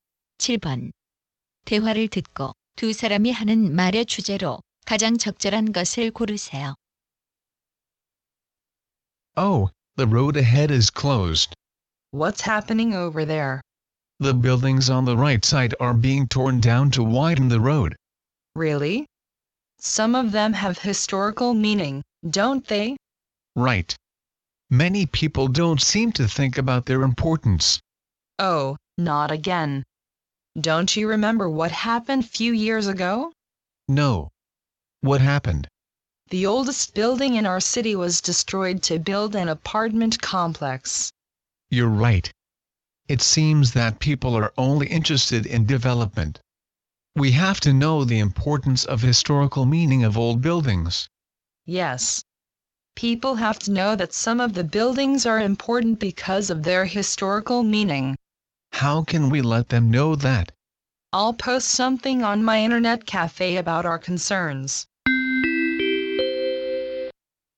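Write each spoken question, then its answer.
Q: 대화를 듣고 두 사람이 하는 말의 주제로 가장 적절한 것을 고르세요.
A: 역사적 의미가 있는 오래된 건물 보존의 중요성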